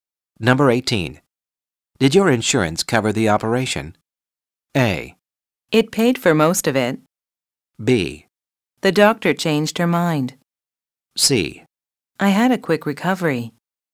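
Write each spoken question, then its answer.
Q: Did your insurance cover the operation?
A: A: It paid for most of it.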